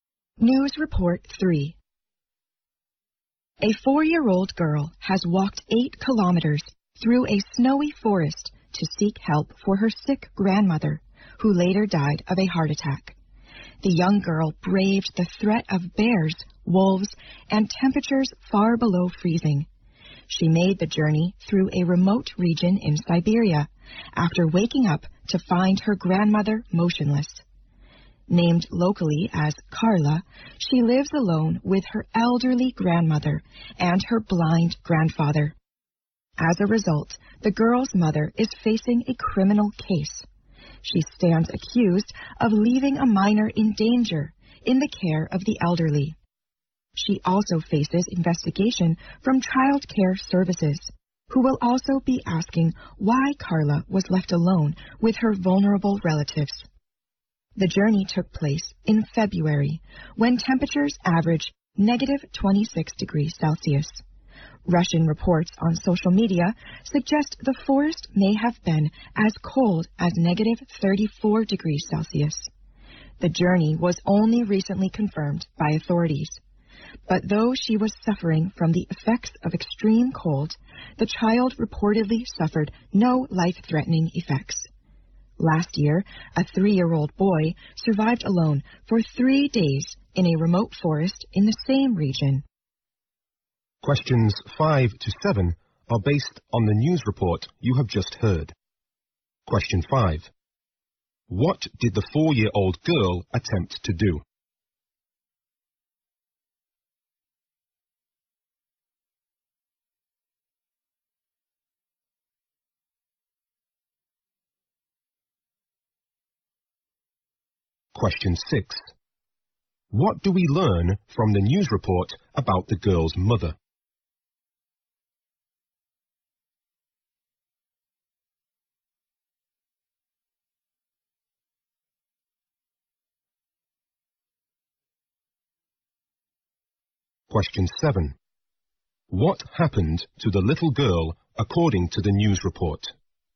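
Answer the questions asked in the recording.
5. Get help for her sick grandmother.
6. She faces a criminal case for leaving a child in danger.
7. She suffered from the extreme cold but had no life-threatening effects.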